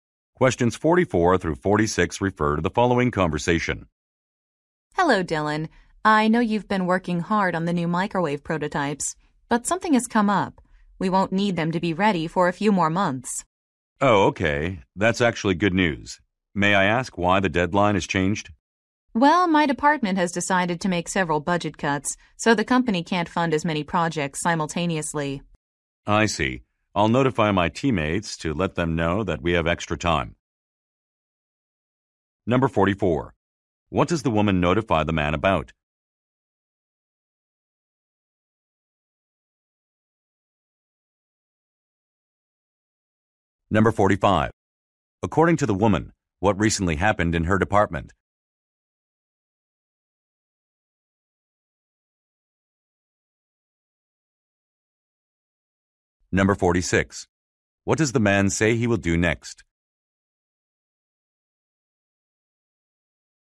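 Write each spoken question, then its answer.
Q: What does the woman notify the man about?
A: The prototype deadline has been pushed back.

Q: According to the woman, what recently happened in her department?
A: Budget cuts were made.

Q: What does the man say he will do next?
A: Tell his teammates.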